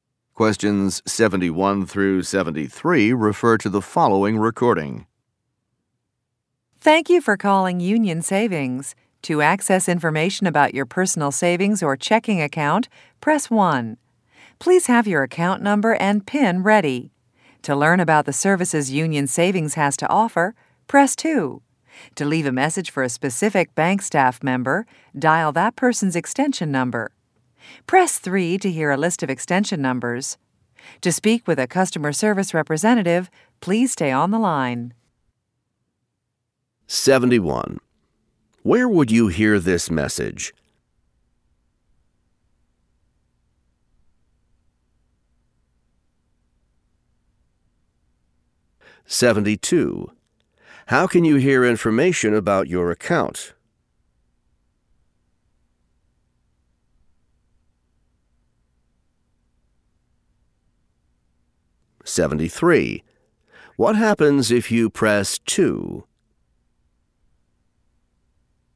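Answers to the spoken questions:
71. On a bank's phone line
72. Press 1
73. You learn about the bank's services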